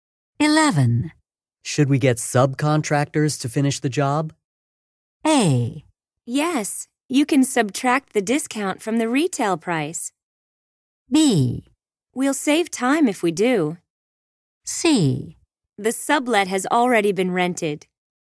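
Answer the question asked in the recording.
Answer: B: We'll save time if we do.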